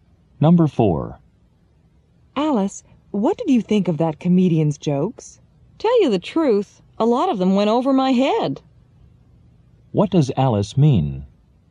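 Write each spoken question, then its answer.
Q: What does Alice mean?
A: She didn't understand many of the jokes.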